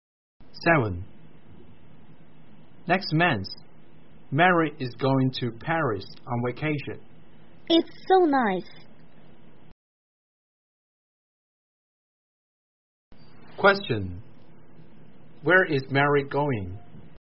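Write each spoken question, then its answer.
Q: Where is Mary going?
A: Paris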